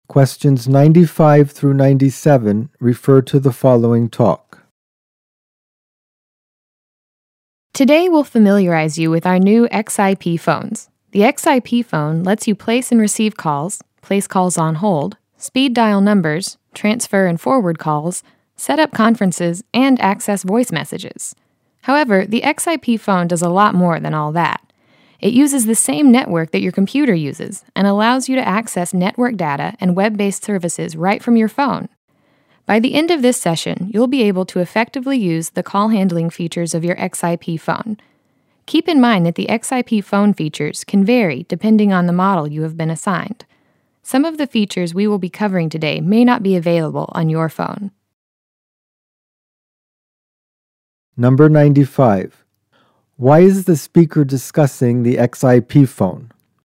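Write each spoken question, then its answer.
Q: Why is the speaker discussing the XIP phone?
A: To train staff to use the new phones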